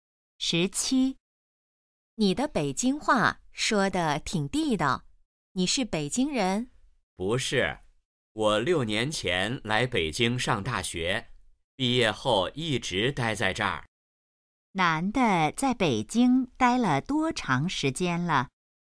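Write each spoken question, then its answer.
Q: 男的在北京待了多长时间了?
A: 六年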